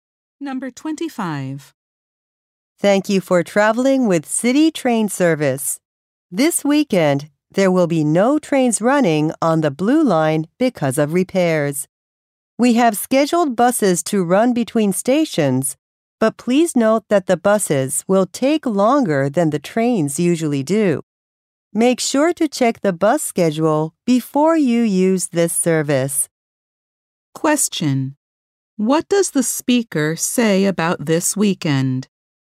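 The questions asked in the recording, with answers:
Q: Question. What does the speaker say about this weekend?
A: No Blue Line trains will run; buses will replace them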